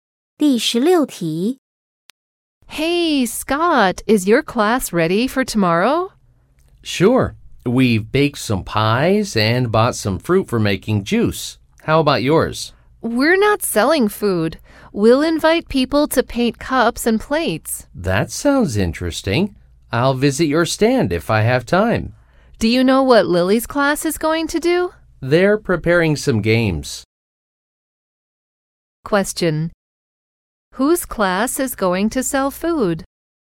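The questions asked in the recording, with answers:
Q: Whose class is going to sell food?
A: Scott's class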